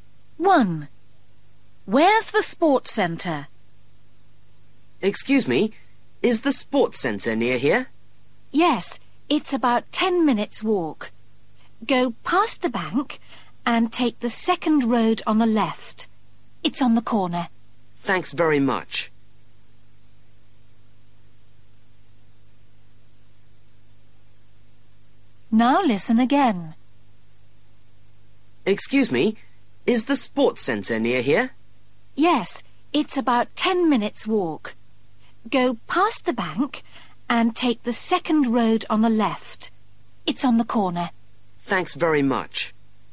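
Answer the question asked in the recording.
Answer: On the corner of the second road on the left, past the bank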